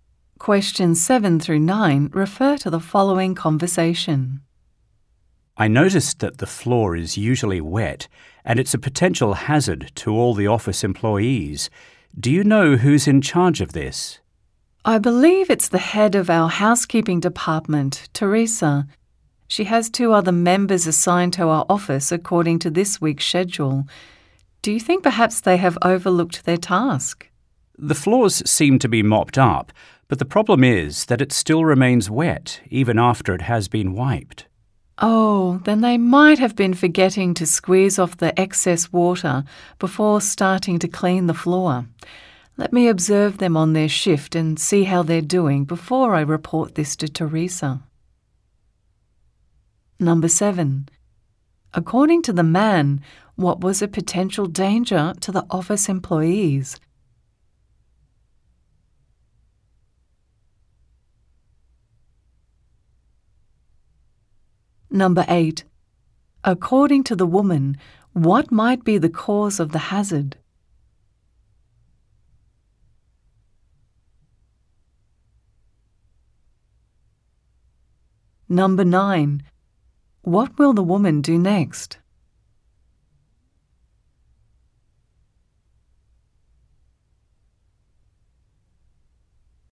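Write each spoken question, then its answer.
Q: According to the man, what was a potential danger to the office employees?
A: The floor is usually wet

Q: According to the woman, what might be the cause of the hazard?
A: The cleaners forget to squeeze off the excess water before cleaning the floor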